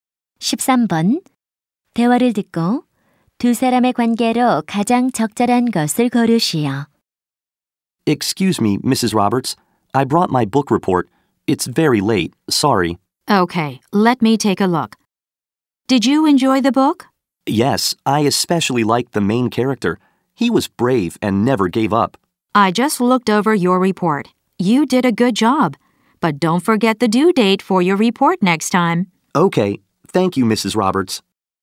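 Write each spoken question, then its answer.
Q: 대화를 듣고 두 사람의 관계로 가장 적절한 것을 고르시오.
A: 교사와 학생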